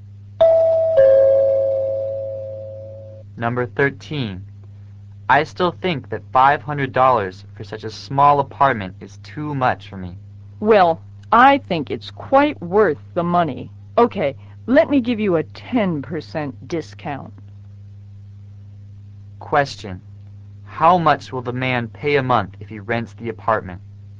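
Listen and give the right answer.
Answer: $450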